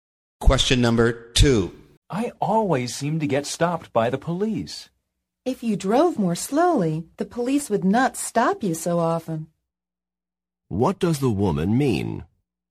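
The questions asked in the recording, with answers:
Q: What does the woman mean?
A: He drives too fast.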